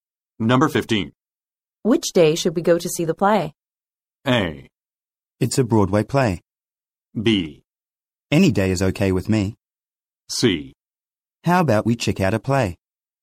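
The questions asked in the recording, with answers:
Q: Which day should we go to see the play?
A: B: Any day is okay with me.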